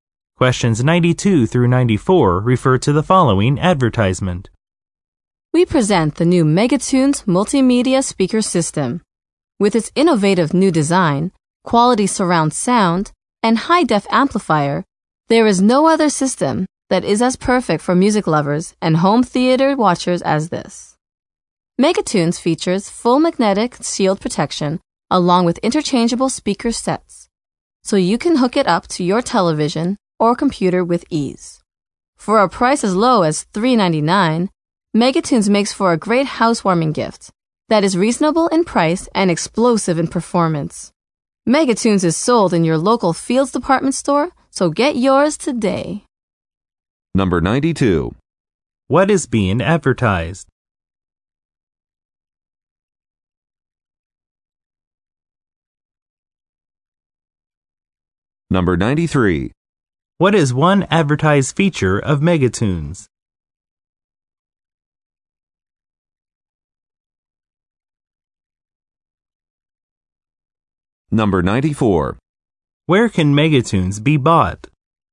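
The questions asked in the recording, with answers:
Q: What is being advertised?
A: A multimedia speaker system

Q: What is one advertised feature of Megatunes?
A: Full magnetic shield protection / interchangeable speaker sets

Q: Where can Megatunes be bought?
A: At local Fields department stores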